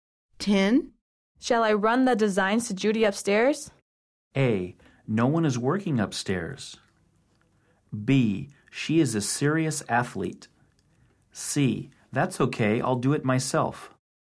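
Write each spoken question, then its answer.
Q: Shall I run the designs to Judy upstairs?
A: C: That's okay, I'll do it myself.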